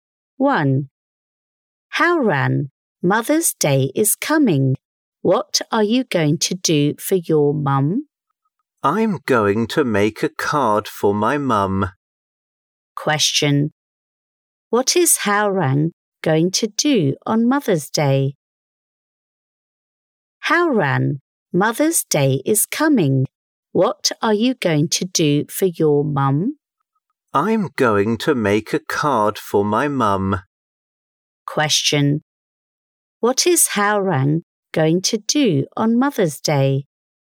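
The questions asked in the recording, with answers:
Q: What is Howran going to do on Mother's Day?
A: Make a card for his mum.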